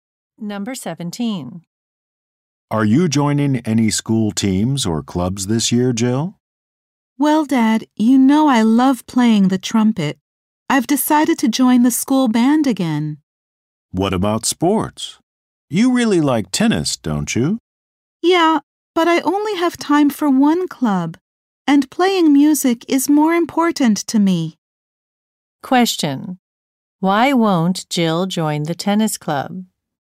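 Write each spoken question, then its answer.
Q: Why won't Jill join the tennis club?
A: She only has time for one club, and music is more important to her.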